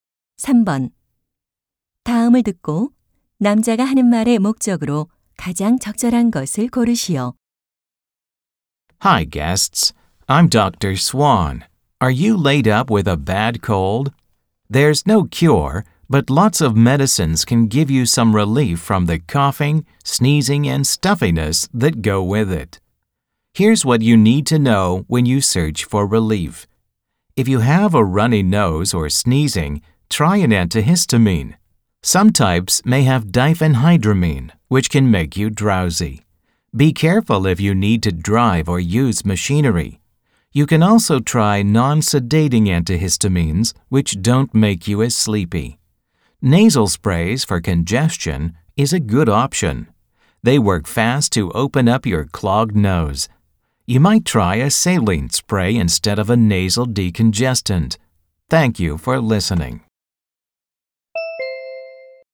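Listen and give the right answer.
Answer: 감기 증상 완화를 위한 약 선택 방법을 조언하려고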